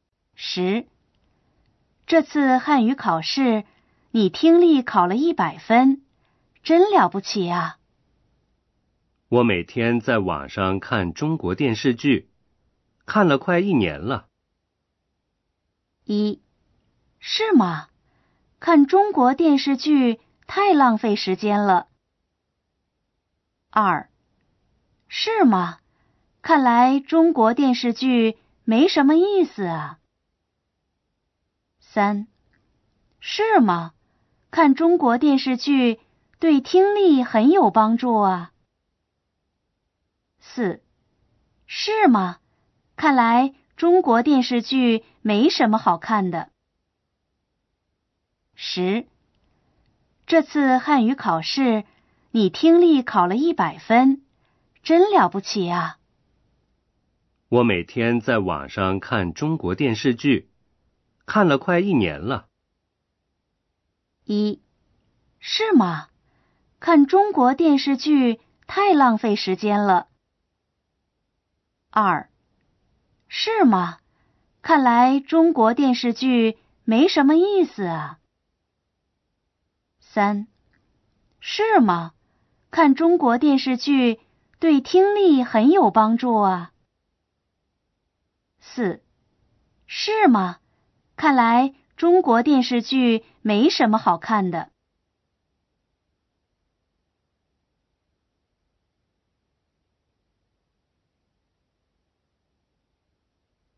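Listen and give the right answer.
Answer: 三: 是吗?看中国电视剧对听力很有帮助啊。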